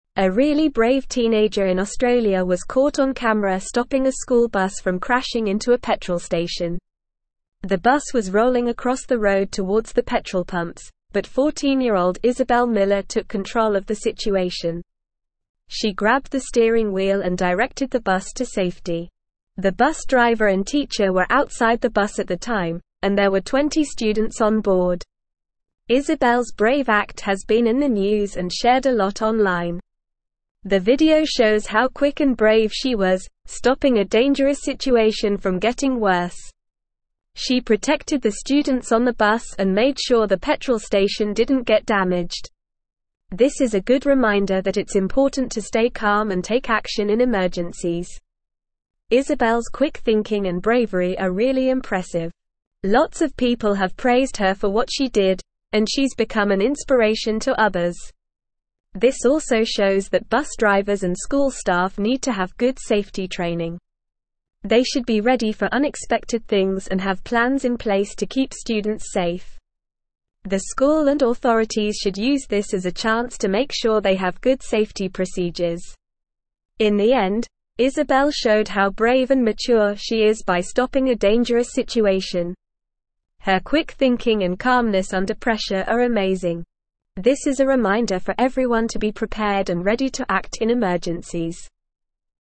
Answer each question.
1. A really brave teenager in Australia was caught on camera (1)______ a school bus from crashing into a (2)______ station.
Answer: stopping

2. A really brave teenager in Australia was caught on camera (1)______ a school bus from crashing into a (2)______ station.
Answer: petrol

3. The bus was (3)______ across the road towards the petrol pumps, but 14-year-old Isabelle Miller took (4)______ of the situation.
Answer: rolling

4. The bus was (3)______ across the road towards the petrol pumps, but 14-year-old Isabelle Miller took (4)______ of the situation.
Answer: control

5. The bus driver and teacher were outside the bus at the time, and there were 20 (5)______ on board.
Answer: students

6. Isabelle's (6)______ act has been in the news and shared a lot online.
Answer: brave

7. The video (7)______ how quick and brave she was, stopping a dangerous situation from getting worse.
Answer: shows

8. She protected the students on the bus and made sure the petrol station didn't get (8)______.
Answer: damaged

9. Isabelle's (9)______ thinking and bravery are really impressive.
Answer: quick

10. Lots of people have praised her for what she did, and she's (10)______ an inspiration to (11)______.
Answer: become

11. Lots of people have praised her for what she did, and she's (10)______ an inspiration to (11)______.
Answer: others

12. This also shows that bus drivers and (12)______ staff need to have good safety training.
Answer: school

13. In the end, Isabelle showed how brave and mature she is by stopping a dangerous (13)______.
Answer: situation

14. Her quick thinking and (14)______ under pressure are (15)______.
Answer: calmness

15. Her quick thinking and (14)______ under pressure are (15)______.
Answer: amazing

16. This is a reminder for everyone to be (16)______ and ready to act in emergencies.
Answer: prepared

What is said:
A really brave teenager in Australia was caught on camera stopping a school bus from crashing into a petrol station. The bus was rolling across the road towards the petrol pumps, but 14-year-old Isabelle Miller took control of the situation. She grabbed the steering wheel and directed the bus to safety. The bus driver and teacher were outside the bus at the time, and there were 20 students on board.
Isabelle's brave act has been in the news and shared a lot online. The video shows how quick and brave she was, stopping a dangerous situation from getting worse. She protected the students on the bus and made sure the petrol station didn't get damaged.
This is a good reminder that it's important to stay calm and take action in emergencies. Isabelle's quick thinking and bravery are really impressive. Lots of people have praised her for what she did, and she's become an inspiration to others.
This also shows that bus drivers and school staff need to have good safety training. They should be ready for unexpected things and have plans in place to keep students safe. The school and authorities should use this as a chance to make sure they have good safety procedures.
In the end, Isabelle showed how brave and mature she is by stopping a dangerous situation. Her quick thinking and calmness under pressure are amazing. This is a reminder for everyone to be prepared and ready to act in emergencies.

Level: Level 3